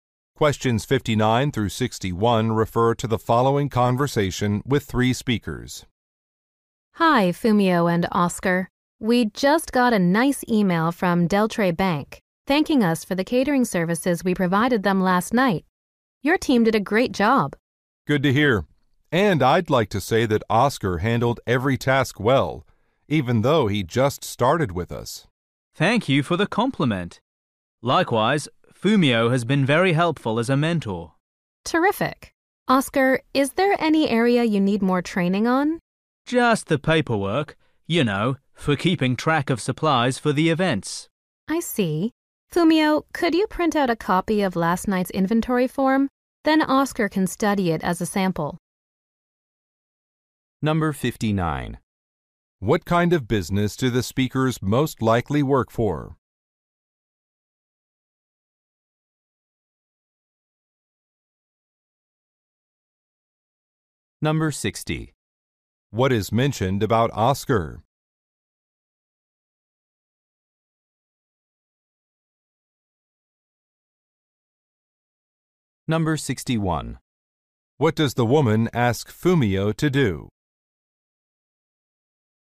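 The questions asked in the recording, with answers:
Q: What kind of business do the speakers most likely work for?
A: A catering company

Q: What is mentioned about Oscar?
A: He recently started working there

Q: What does the woman ask Fumio to do?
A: Print a copy of an inventory form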